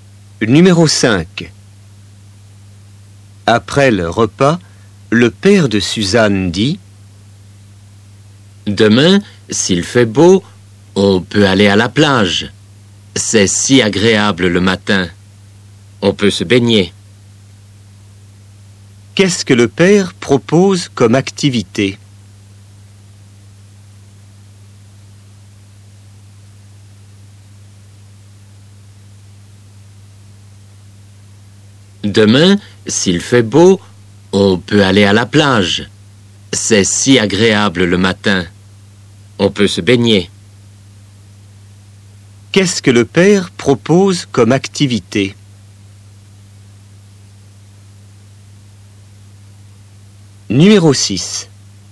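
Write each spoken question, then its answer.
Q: Qu'est-ce que le père propose comme activité?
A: aller à la plage et se baigner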